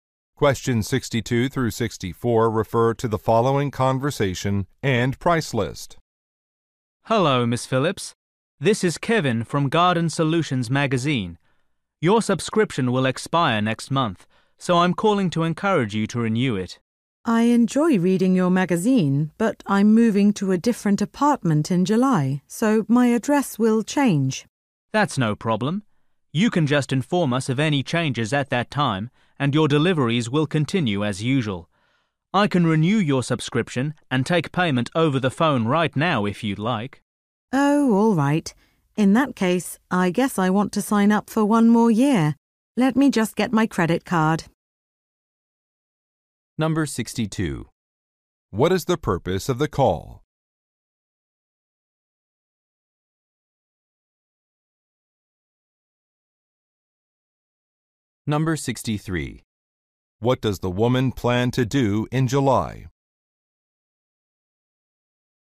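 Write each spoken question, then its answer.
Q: What is the purpose of the call?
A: To encourage renewing a subscription

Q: What does the woman plan to do in July?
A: Move to a different apartment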